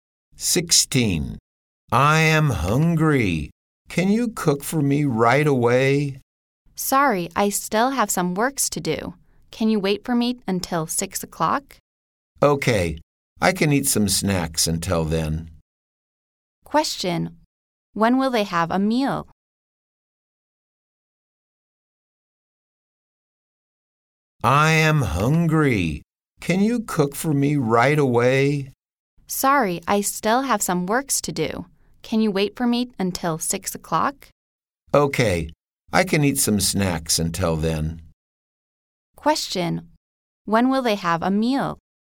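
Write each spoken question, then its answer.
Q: When will they have a meal?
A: At 6 o'clock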